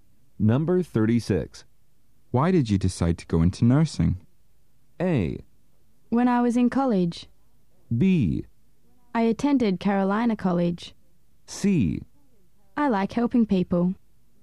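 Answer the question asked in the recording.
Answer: C: I like helping people.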